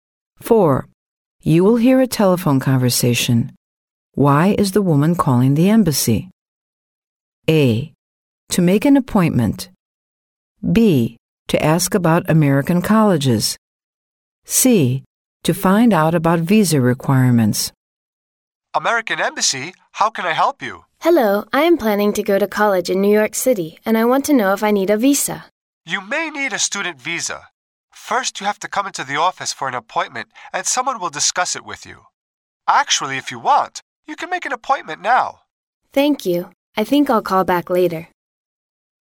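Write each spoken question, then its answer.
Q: Why is the woman calling the embassy?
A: C: To find out about visa requirements.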